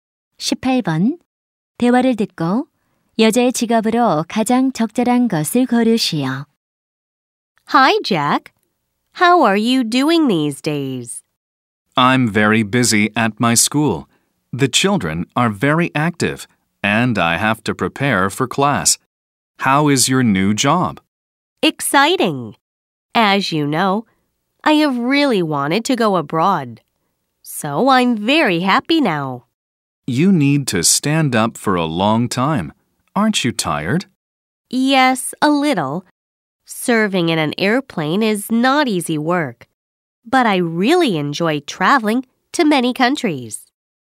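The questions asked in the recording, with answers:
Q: 대화를 듣고 여자의 직업으로 가장 적절한 것을 고르시오.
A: 승무원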